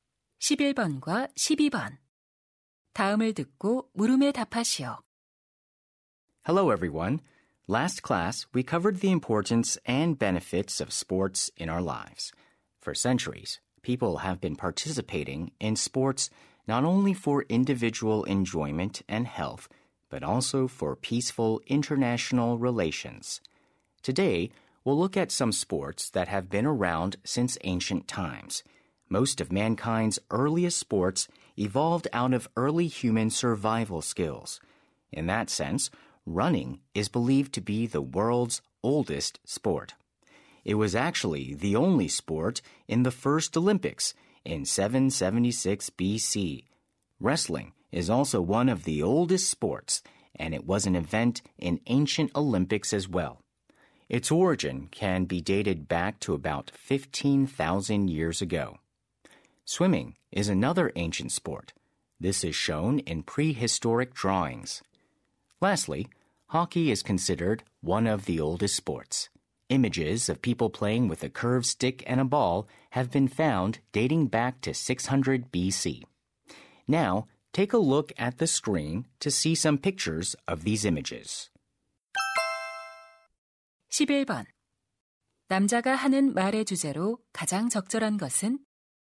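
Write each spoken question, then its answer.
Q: 남자가 하는 말의 주제로 가장 적절한 것은?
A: 고대부터 존재해 온 스포츠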